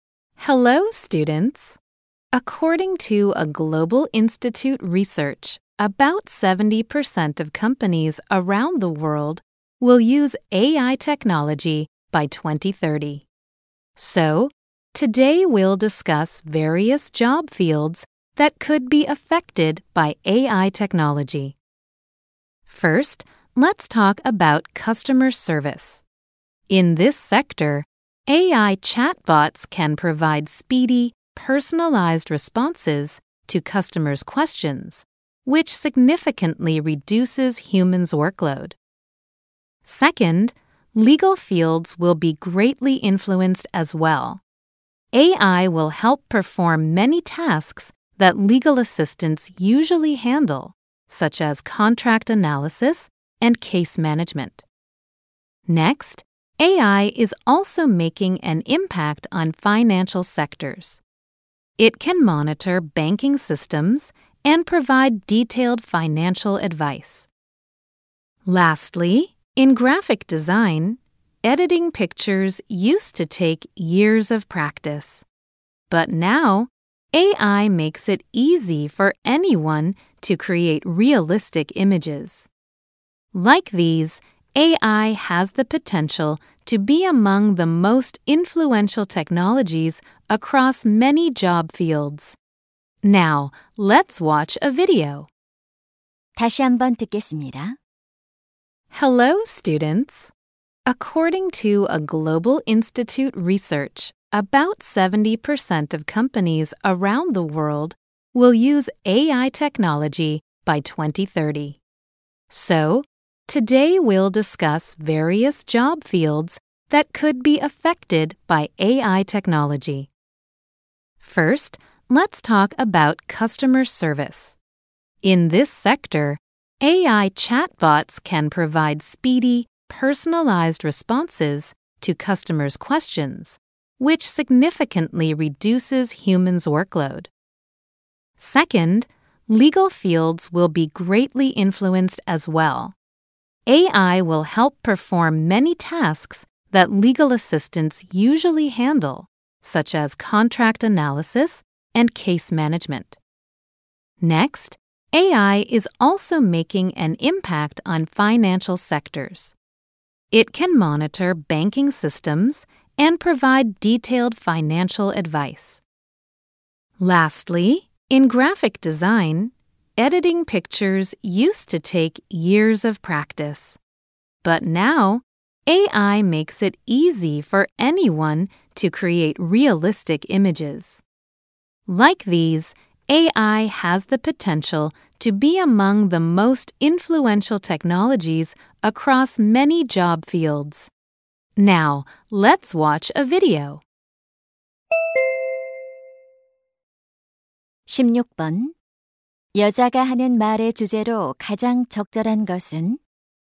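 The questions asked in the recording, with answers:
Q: 여자가 하는 말의 주제로 가장 적절한 것은?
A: AI 기술의 영향을 받을 수 있는 다양한 직업 분야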